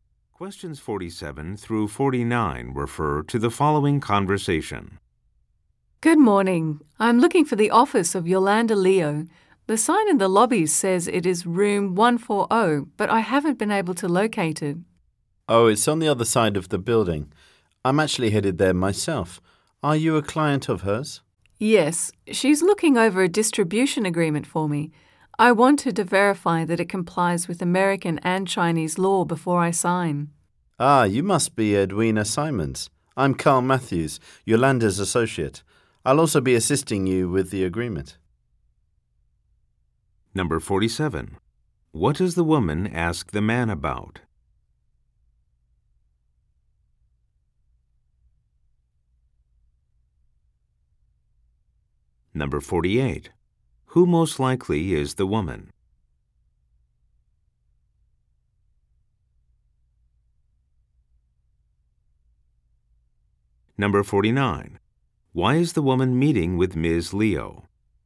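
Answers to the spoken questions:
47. Where Yolanda Leo's office is
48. A client of Yolanda Leo
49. To have her distribution agreement checked against American and Chinese law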